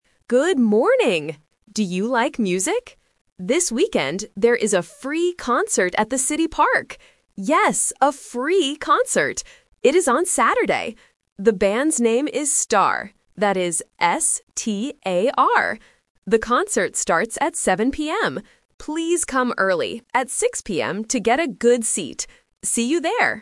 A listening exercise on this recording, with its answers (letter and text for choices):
Listen to the radio announcement about a weekend event and choose the correct answer (A, B, or C) for each question.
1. What day is the concert?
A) Saturday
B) Sunday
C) Friday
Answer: A) Saturday

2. What is the name of the band?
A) Spar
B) Sun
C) Star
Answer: C) Star

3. What time does the concert start?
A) 6:00 PM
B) 7:00 PM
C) 8:00 PM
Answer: B) 7:00 PM

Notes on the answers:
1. The announcer explicitly says, "It is on Saturday." Option (B) "Sunday" is a trap because the speaker mentions "This weekend," and Sunday is part of the weekend, but it is not the correct day. Option (C) "Friday" is not mentioned.
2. The speaker clearly spells out the name: "That is S-T-A-R." Option (A) "Spar" is a distractor because it sounds very similar to "Star". Option (B) "Sun" is a plausible band name but is never mentioned.
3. The announcer states, "The concert starts at 7:00 PM." Option (A) "6:00 PM" is a trap; it is mentioned in the audio, but it is the time you should arrive to "get a good seat," not the start time. Option (C) "8:00 PM" is not mentioned.

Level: A1